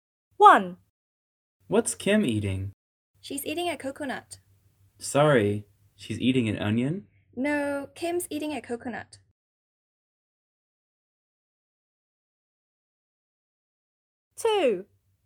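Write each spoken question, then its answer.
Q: What's Kim eating?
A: a coconut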